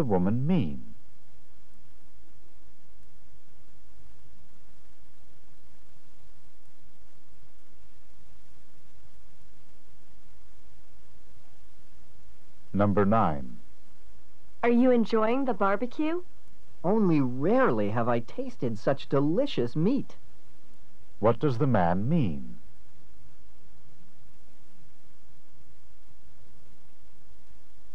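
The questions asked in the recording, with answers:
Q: What does the man mean?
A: Yes, the meat is unusually delicious.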